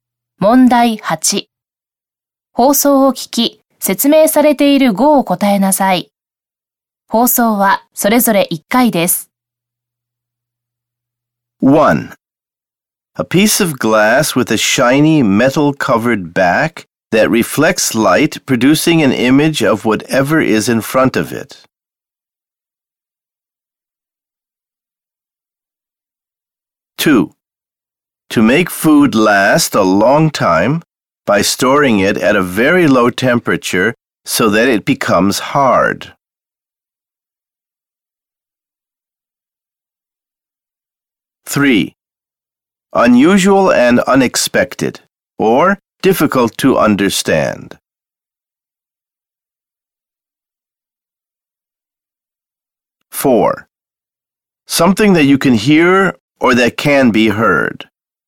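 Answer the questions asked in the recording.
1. mirror
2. freeze
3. strange
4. sound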